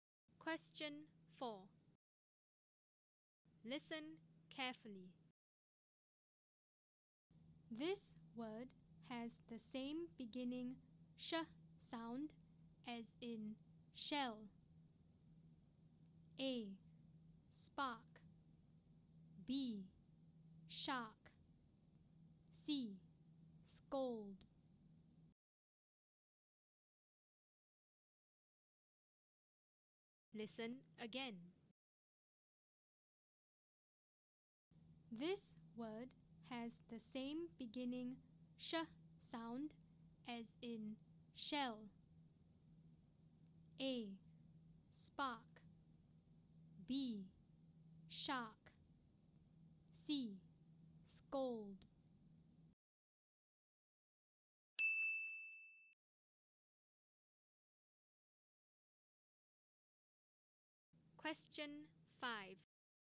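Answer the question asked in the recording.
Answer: B: Shark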